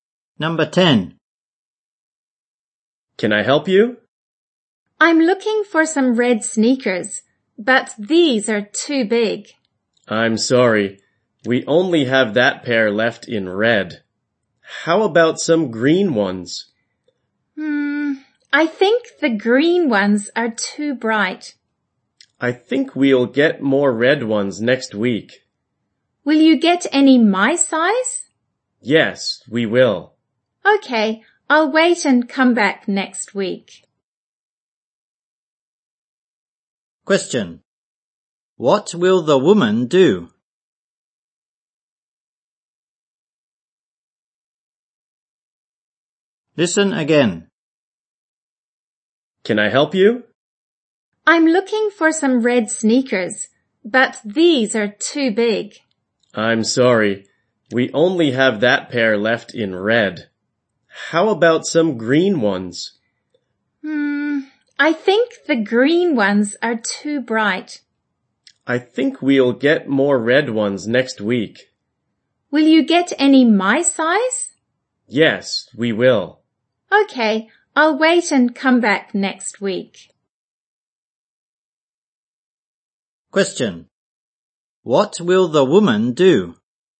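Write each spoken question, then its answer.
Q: What will the woman do?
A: Come back next week for red sneakers in her size.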